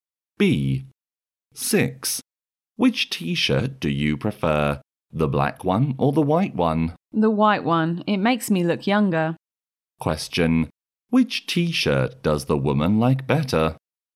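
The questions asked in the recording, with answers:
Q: Which t-shirt does the woman like better?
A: The white one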